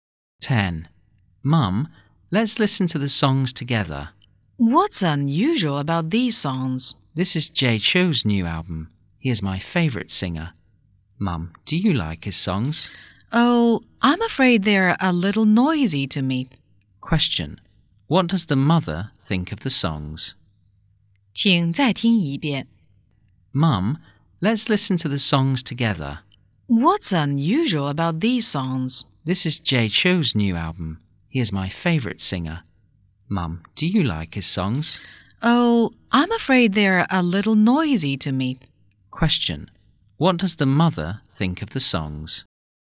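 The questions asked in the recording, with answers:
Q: Question, what does the mother think of the songs?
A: They are a little noisy.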